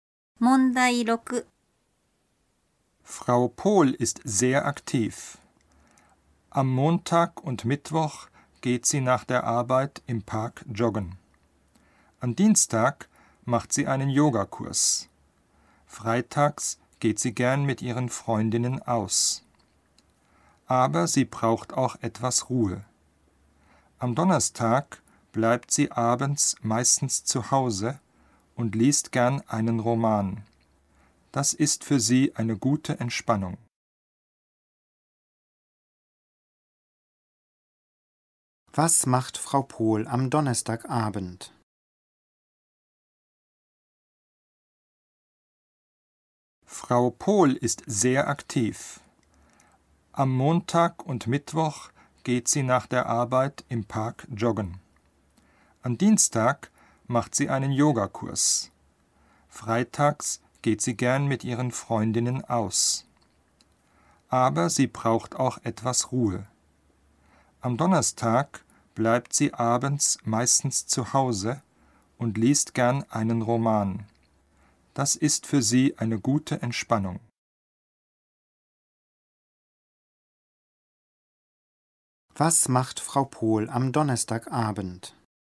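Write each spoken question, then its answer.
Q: Was macht Frau Pohl am Donnerstagabend?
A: Sie bleibt zu Hause und liest einen Roman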